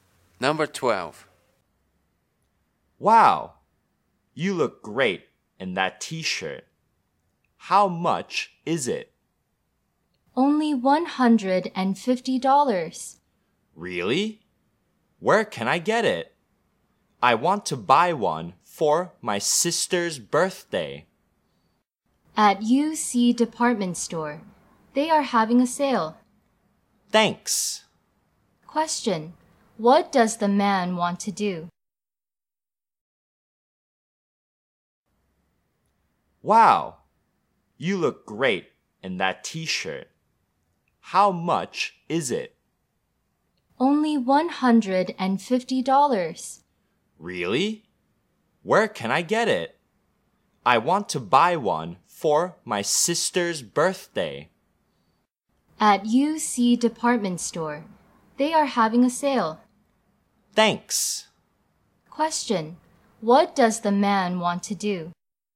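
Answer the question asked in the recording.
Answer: Buy a T-shirt for his sister's birthday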